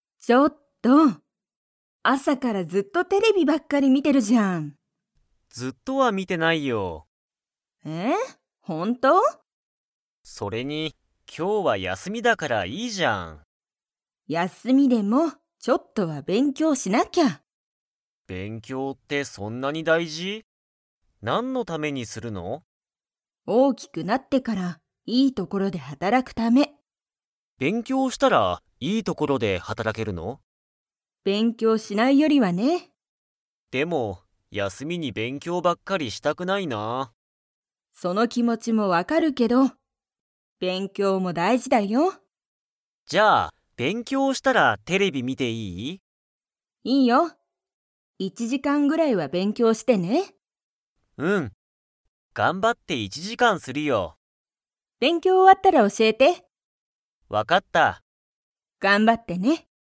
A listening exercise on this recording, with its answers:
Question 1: たかしは、休やすみに 。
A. 仕事(しごと)だけしたい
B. テレビを見みたくない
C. 勉強(べんきょう)ばっかりしたくない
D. 学校(がっこう)にめっちゃ行(い)きたい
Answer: C. 勉強(べんきょう)ばっかりしたくない

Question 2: たかしは、勉強(べんきょう)が終(お)わったら、テレビを見みますか?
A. はい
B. いいえ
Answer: A. はい

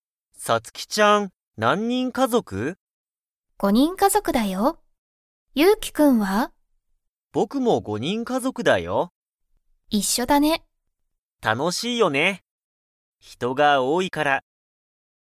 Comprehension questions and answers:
ゆうきは、____家族(かぞく)だ。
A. 3(さん)人(にん)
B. 4(よ)人(にん)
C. 5(ご)人(にん)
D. 6(ろく)人(にん)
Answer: C. 5(ご)人(にん)

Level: Level 1

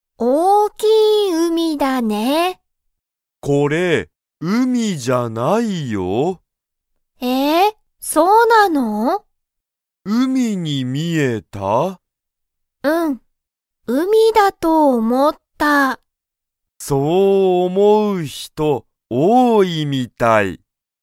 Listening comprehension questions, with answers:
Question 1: 海(うみ)だと思(おも)う人(ひと)は、____みたいだ。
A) 新あたらしい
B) 高たかい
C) 多(おお)い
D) 少(すく)ない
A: C) 多(おお)い

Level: Level 1

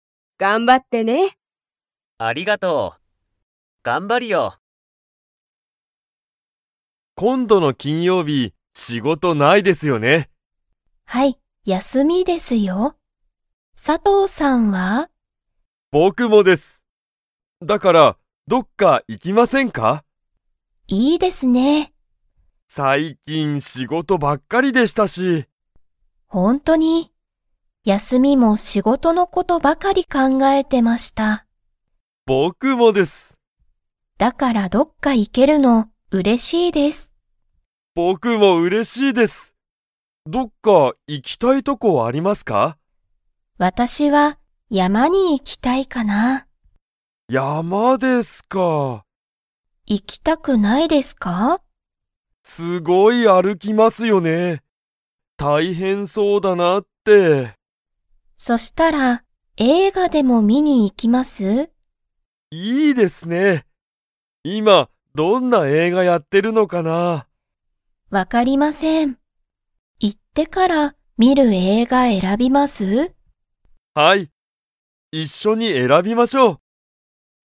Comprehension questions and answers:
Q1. 佐藤(さとう)さんは____、仕事(しごと)ばっかりだった。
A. 今度(こんど)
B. 今(いま)すぐ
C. 最近(さいきん)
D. 一緒(いっしょ)に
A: C. 最近(さいきん)

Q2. 田中(たなか)さんと佐藤(さとう)さんは、今度山(こんどやま)に行(い)きますか?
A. はい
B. いいえ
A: B. いいえ

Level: Level 2

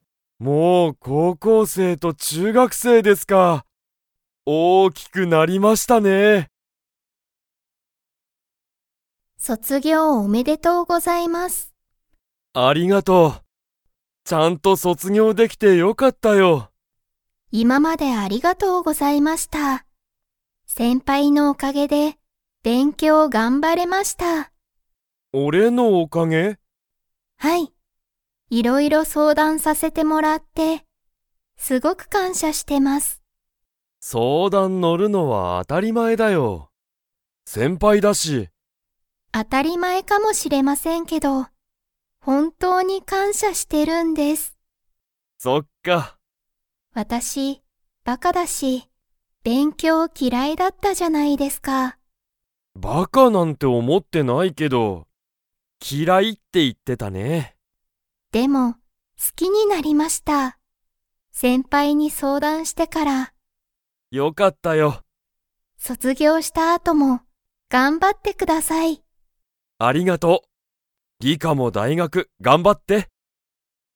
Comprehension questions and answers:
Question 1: リカは、 のおかげで勉強べんきょうを頑張がんばれた。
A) 先生せんせい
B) 大学だいがく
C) 先輩せんぱい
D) 仕事しごと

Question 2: リカは、はじめから勉強べんきょうが好すきでしたか?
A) はい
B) いいえ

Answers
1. C) 先輩せんぱい
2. B) いいえ

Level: Level 4

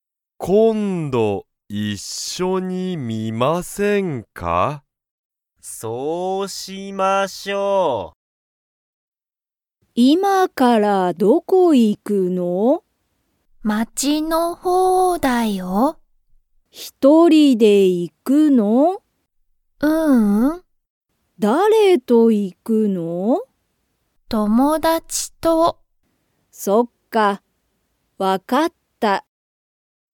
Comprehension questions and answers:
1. ナナは、今(いま)から____に行(い)く。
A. 友達(ともだち)の家(いえ)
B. 街(まち)の方(ほう)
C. 友達(ともだち)の学校(がっこう)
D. 一人(ひとり)))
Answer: B. 街(まち)の方(ほう)

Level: Level 1

